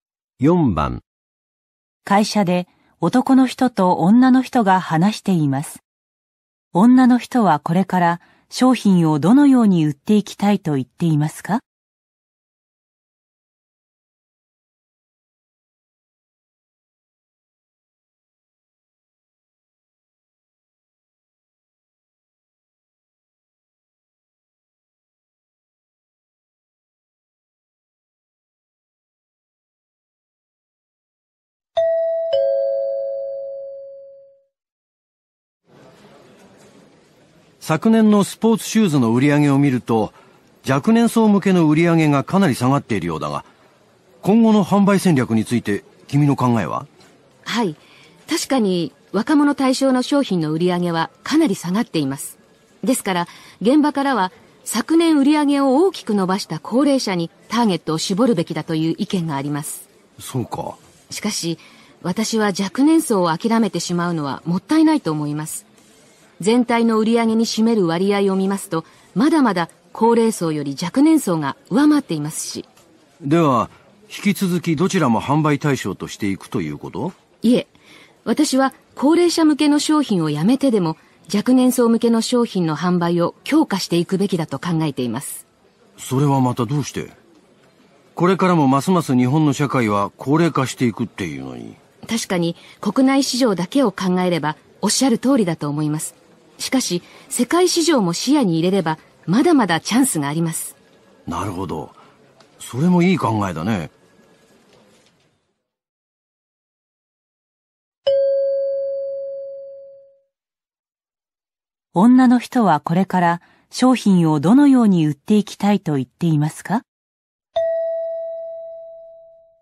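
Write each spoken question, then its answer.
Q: 女の人はこれから商品をどのように売っていきたいと言っていますか?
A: 高齢者向けをやめても若年層向けを強化し、世界市場で売る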